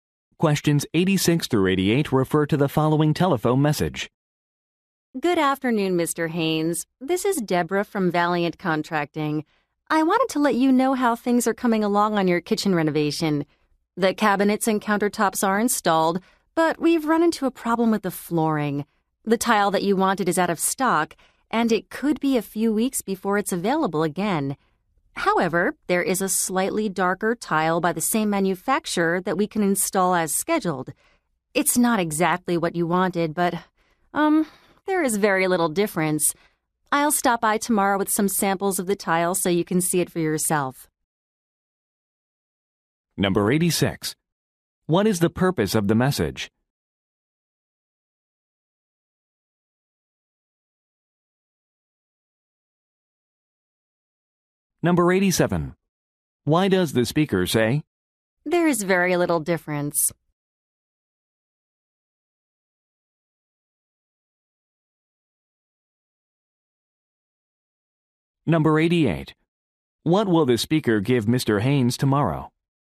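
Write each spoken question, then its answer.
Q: What is the purpose of the message?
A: To give an update on the kitchen renovation

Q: Why does the speaker say?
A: To suggest accepting the slightly darker substitute tile

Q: What will the speaker give Mr.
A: Tile samples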